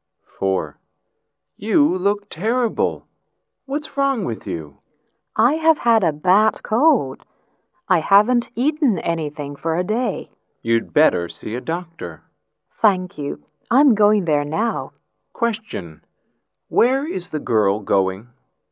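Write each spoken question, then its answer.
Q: Where is the girl going?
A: To the doctor's / hospital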